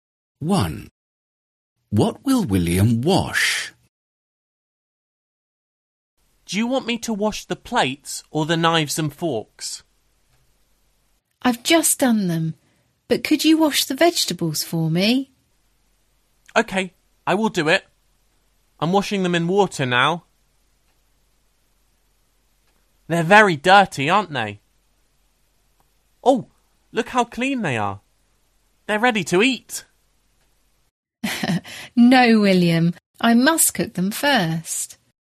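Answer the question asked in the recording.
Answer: the vegetables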